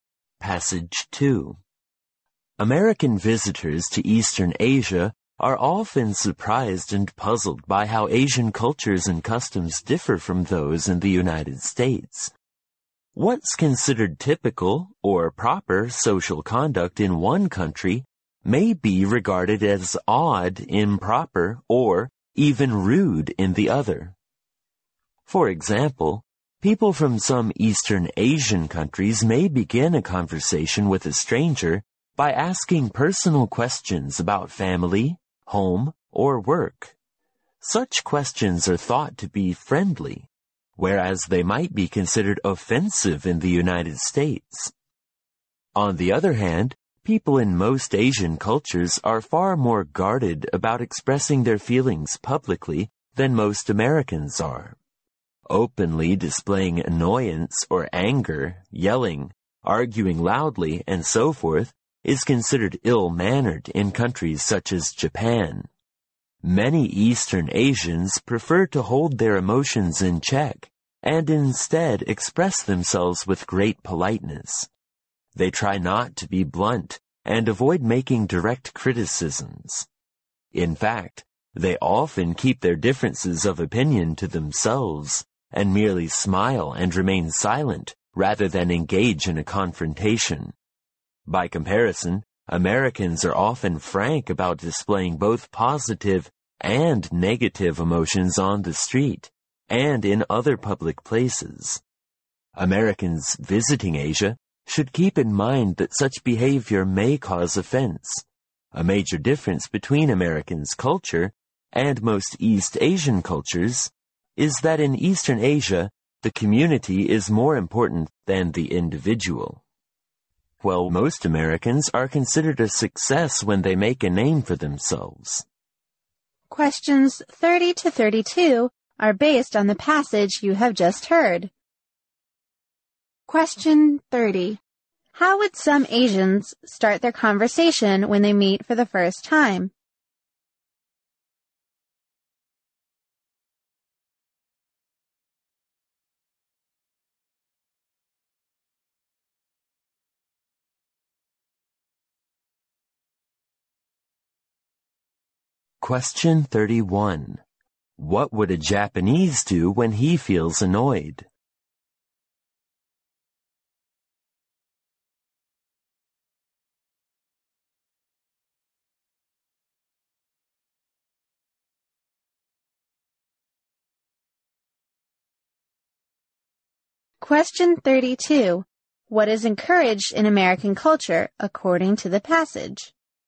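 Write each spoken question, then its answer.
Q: How would some Asians start their conversation when they meet for the first time?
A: By asking personal questions about family, home or work

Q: What would a Japanese do when he feels annoyed?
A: Hold his emotions in check, smile and stay silent

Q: What is encouraged in American culture according to the passage?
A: Individual success, making a name for oneself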